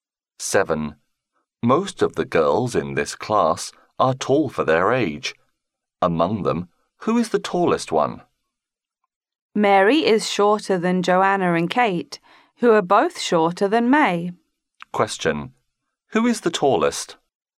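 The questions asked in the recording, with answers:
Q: Who is the tallest?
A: May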